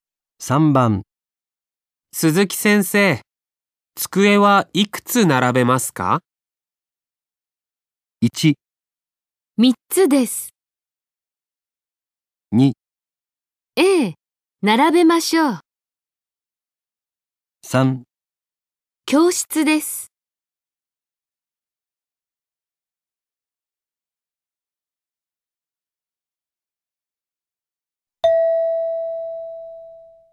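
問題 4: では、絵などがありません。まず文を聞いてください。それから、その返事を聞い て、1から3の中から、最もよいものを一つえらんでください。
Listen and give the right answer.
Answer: 3つです。

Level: N5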